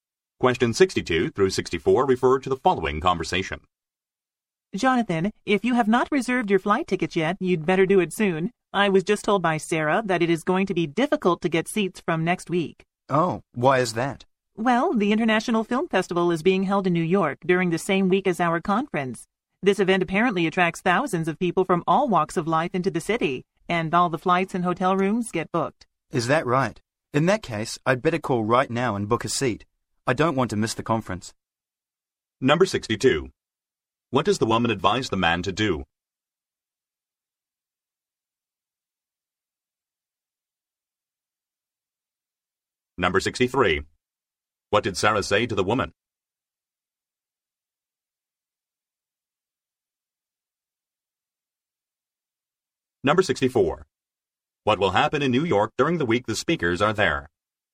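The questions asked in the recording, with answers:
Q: What does the woman advise the man to do?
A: Reserve his flight tickets soon

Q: What did Sarah say to the woman?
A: It will be difficult to get seats from next week

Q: What will happen in New York during the week the speakers are there?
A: The International Film Festival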